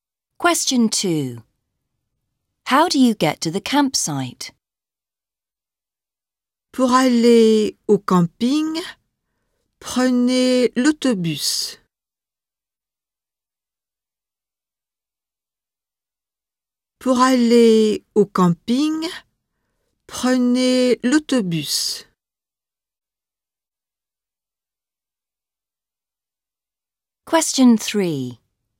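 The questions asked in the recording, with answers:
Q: How do you get to the campsite?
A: By bus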